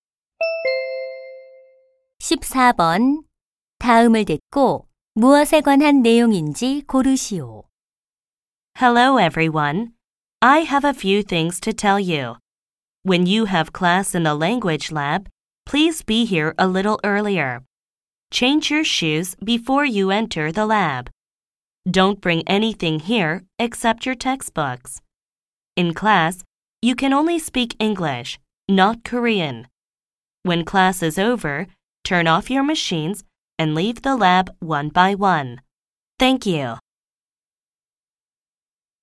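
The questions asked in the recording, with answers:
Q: 다음을 듣고 무엇에 관한 내용인지 고르시오.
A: 어학실 이용 수칙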